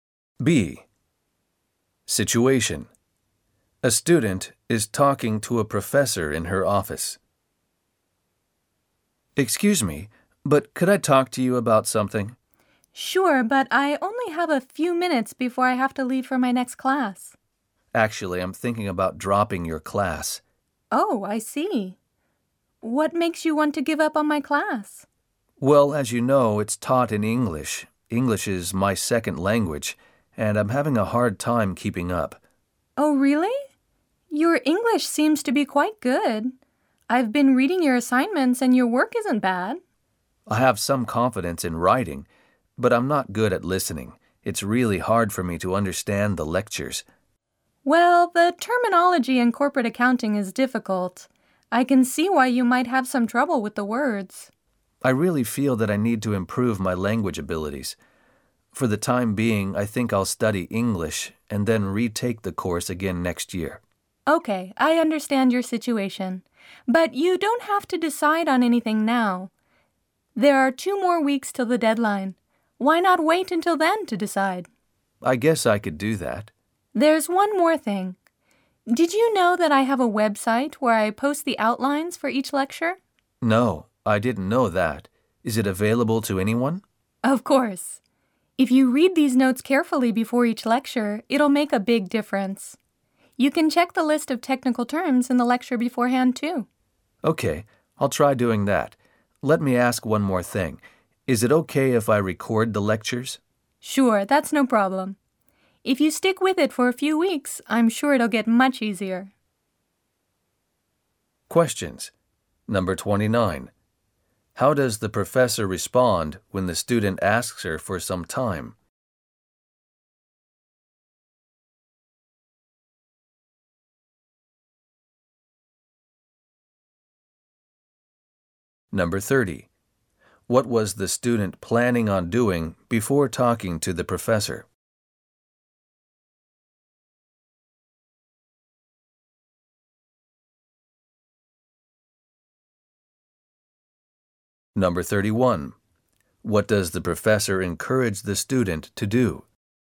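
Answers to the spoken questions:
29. She says she only has a few minutes before her next class
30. Dropping the class to study English and retake it next year
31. Read the lecture outlines on her website before each lecture and stay in the class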